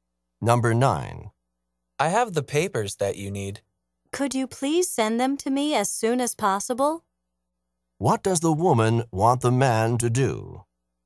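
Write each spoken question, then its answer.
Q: What does the woman want the man to do?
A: Send her the papers as soon as possible.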